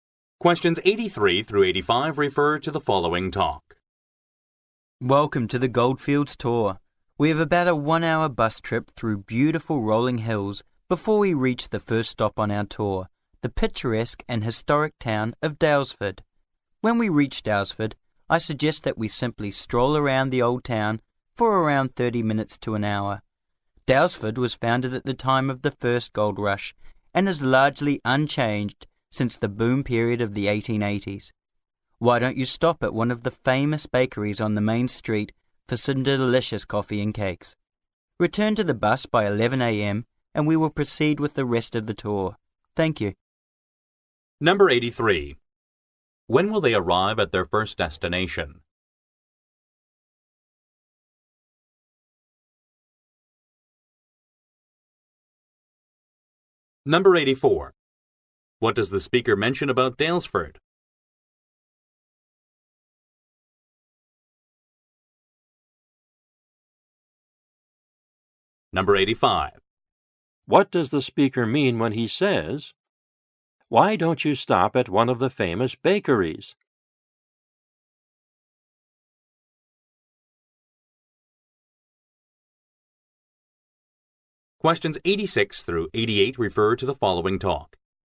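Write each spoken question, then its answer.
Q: When will they arrive at their first destination?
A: In about one hour

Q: What does the speaker mention about Daylesford?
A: It is largely unchanged since the 1880s gold boom

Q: What does the speaker mean when he says, "Why don't you stop at one of the famous bakeries?"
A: He is recommending the bakeries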